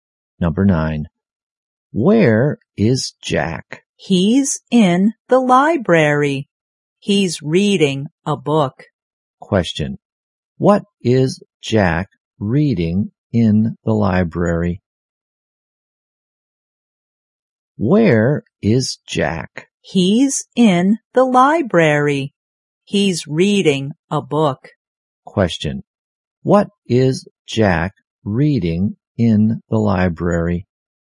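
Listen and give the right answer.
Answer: A book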